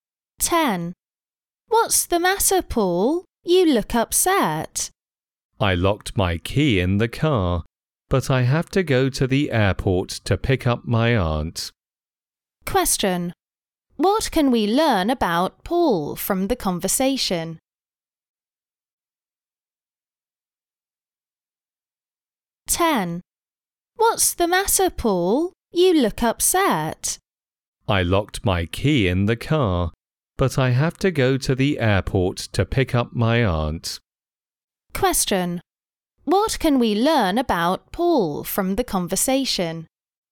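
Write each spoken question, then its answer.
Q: What can we learn about Paul from the conversation?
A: He locked his key in the car and can't drive to the airport to pick up his aunt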